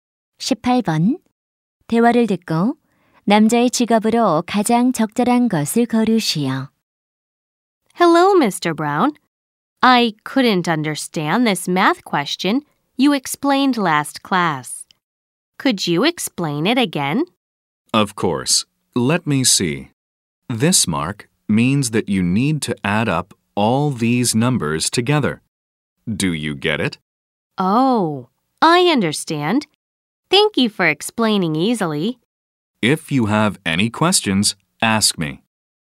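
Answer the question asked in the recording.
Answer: 수학 교사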